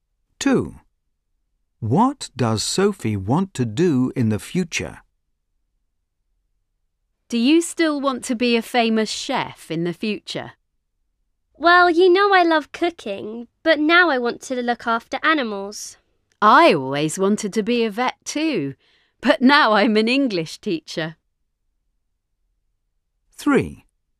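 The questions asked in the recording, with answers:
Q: What does Sophie want to do in the future?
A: look after animals (be a vet)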